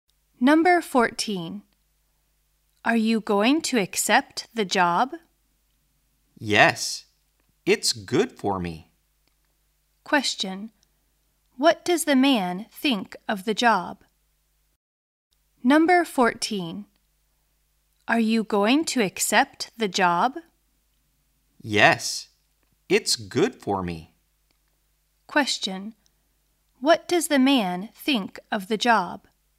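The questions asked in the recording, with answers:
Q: What does the man think of the job?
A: It's good for him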